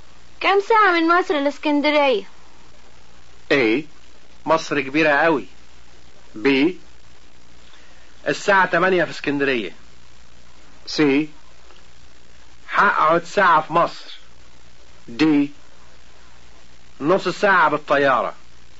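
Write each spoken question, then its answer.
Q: كم ساعة من مصر الاسكندرية؟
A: D: نص ساعة بالطيارة.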